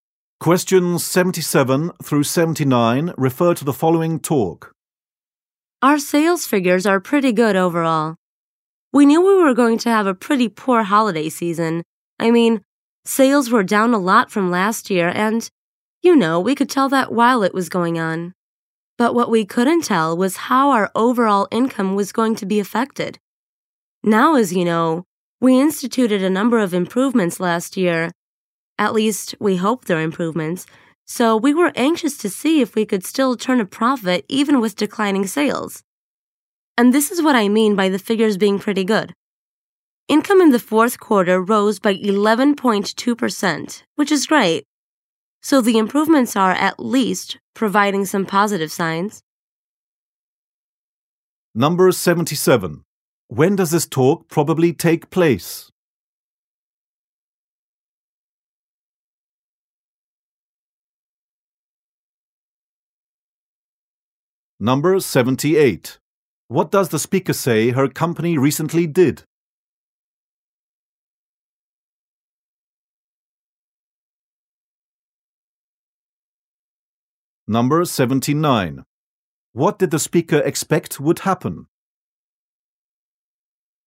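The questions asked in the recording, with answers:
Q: What does the speaker say her company recently did?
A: Made a number of improvements

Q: What did the speaker expect would happen?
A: A poor holiday season with lower sales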